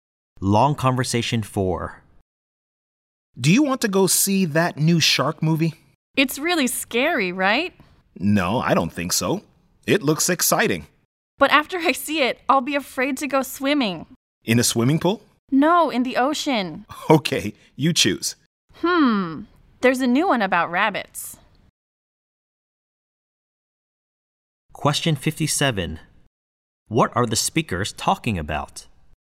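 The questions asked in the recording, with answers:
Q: What are the speakers talking about?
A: Which movie to go and see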